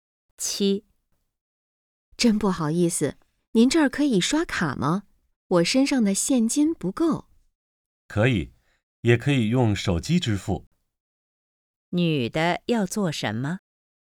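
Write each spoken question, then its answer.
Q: 女的要做什么?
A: 刷卡付款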